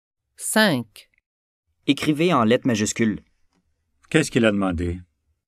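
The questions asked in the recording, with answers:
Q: Qu'est-ce qu'il a demandé?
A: Il a demandé d'écrire en lettres majuscules.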